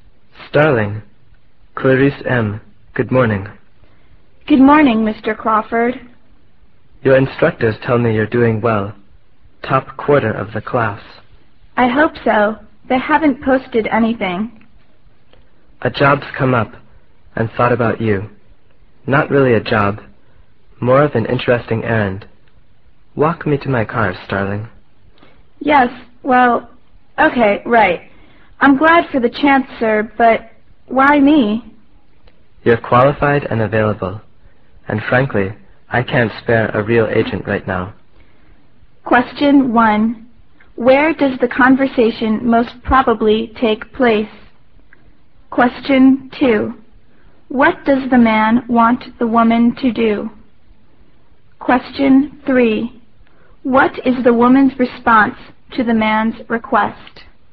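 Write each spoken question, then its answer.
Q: What does the man want the woman to do?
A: Run an errand for him (an assignment)

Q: What is the woman's response to the man's request?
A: She is glad for the chance but asks why he chose her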